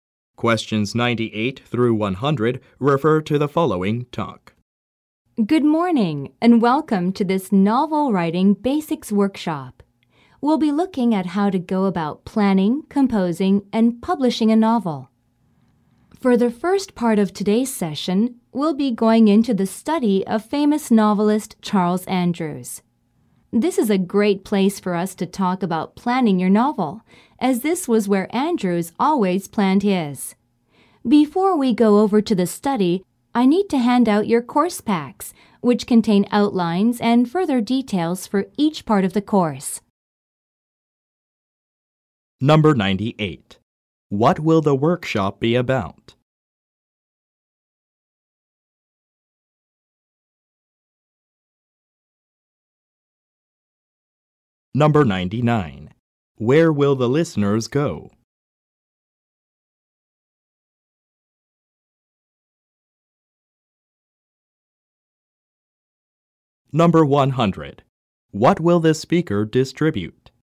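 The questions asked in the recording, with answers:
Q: What will the workshop be about?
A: Novel writing basics

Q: Where will the listeners go?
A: The study of novelist Charles Andrews

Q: What will the speaker distribute?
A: Course packs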